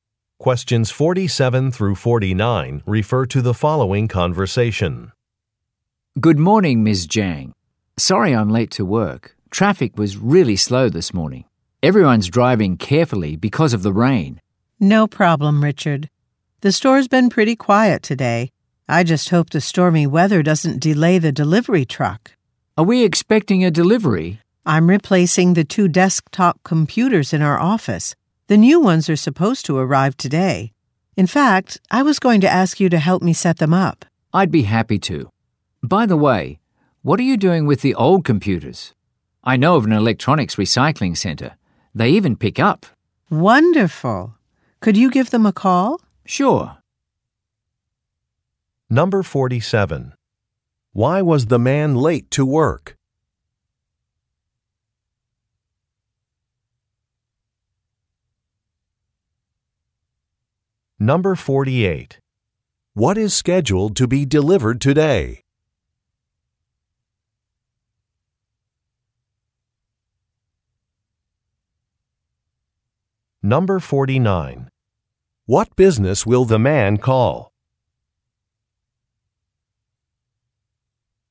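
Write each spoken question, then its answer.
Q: Why was the man late to work?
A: Traffic was slow because of the rain.

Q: What is scheduled to be delivered today?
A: New desktop computers

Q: What business will the man call?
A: An electronics recycling center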